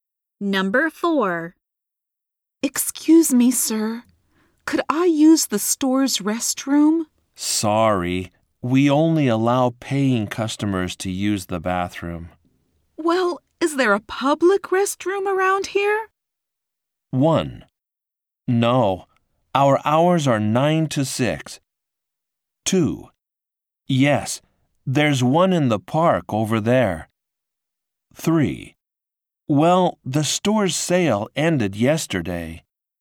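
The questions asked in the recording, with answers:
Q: Well, is there a public restroom around here?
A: 2: Yes, there's one in the park over there.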